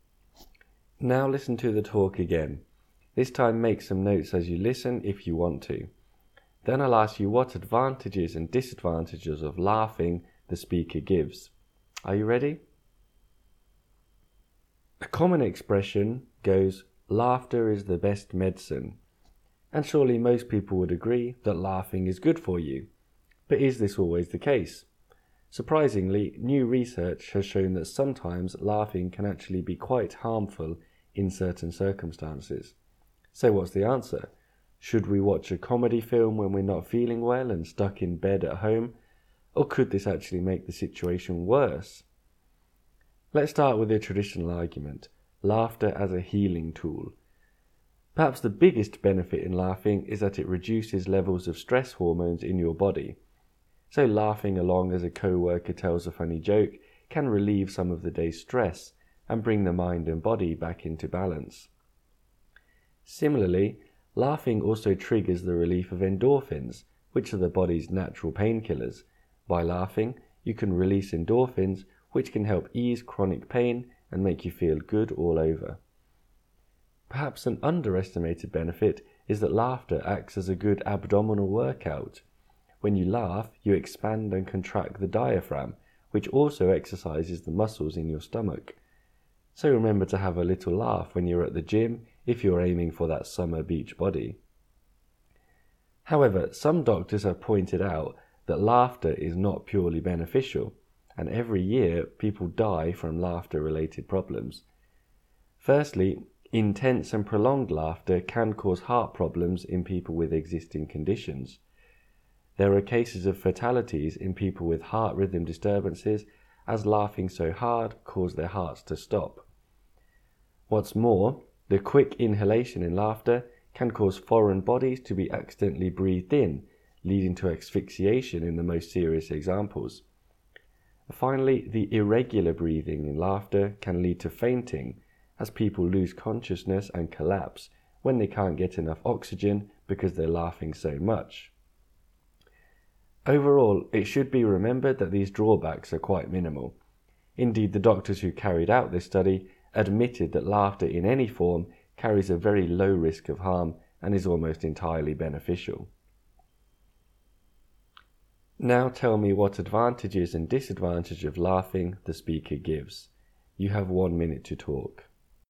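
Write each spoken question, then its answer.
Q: Now tell me what advantages and disadvantages of laughing the speaker gives.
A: Advantages: it lowers stress hormones, releases endorphins that ease pain, and works the stomach muscles. Disadvantages: it can cause heart problems, lead to choking when things are breathed in, and cause fainting.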